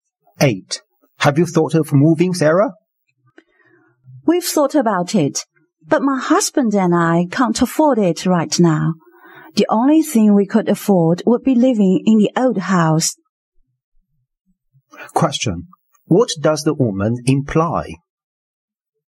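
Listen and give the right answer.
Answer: They can't afford to move now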